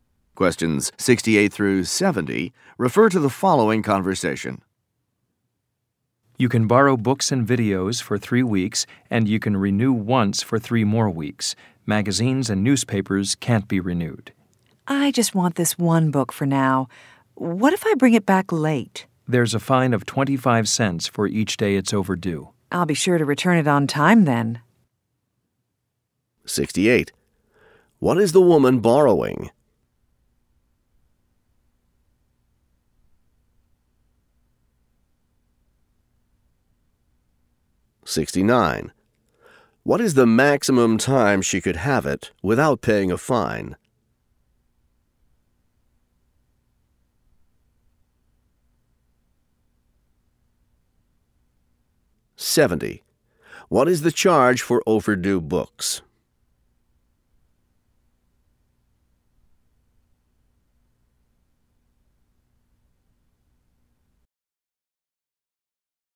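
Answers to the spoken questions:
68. A book
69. 6 weeks
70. 25 cents a day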